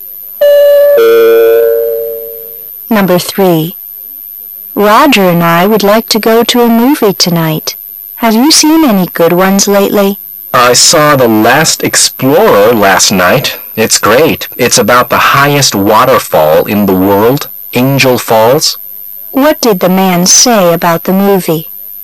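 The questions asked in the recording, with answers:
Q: What did the man say about the movie?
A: It's great; it's about Angel Falls, the highest waterfall

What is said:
[解析] W: Roger and I would like to go to a movie tonight. Have you seen any good ones lately? M: I saw The Last Explorer last night. It's great. It's about the highest waterfall in the world, Angel Falls. Q: What did the man say about the movie?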